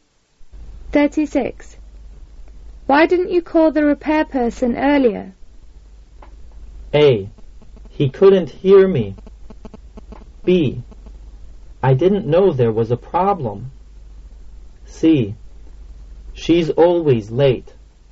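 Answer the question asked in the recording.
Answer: B: I didn't know there was a problem.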